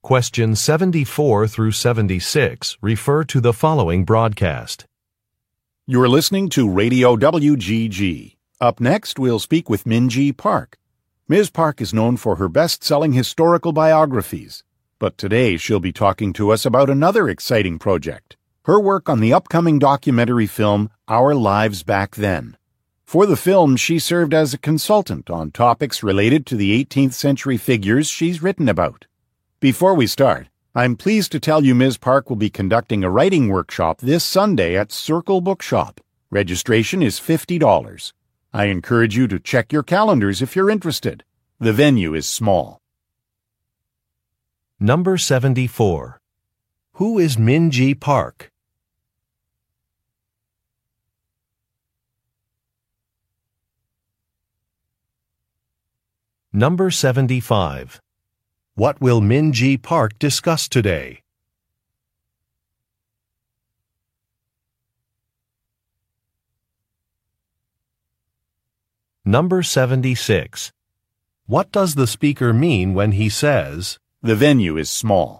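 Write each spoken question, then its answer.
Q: Who is Minji Park?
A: A writer of best-selling historical biographies

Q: What will Minji Park discuss today?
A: Her work on the upcoming documentary film Our Lives Back Then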